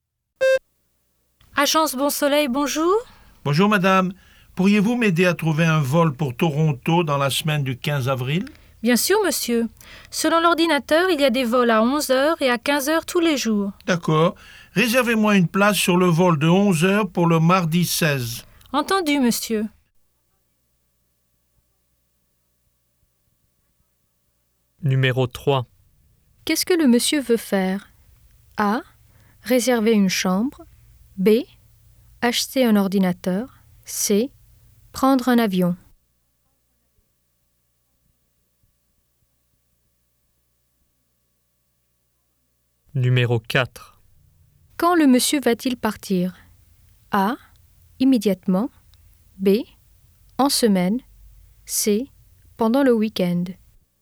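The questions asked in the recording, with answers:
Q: Qu'est-ce que le monsieur veut faire?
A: C: Prendre un avion.

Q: Quand le monsieur va-t-il partir?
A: B: En semaine.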